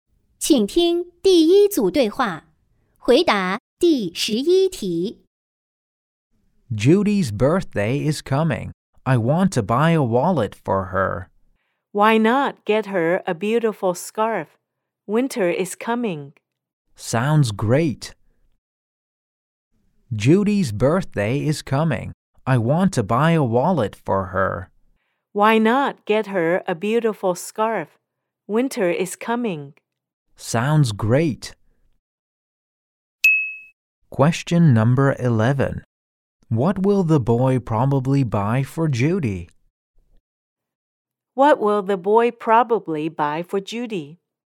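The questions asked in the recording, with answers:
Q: What will the boy probably buy for Judy?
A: A scarf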